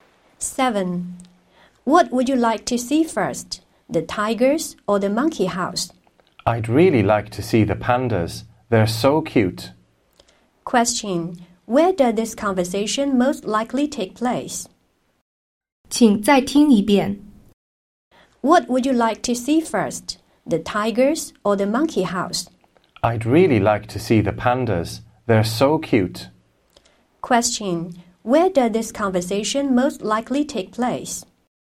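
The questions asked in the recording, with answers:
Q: Where does this conversation most likely take place?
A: At a zoo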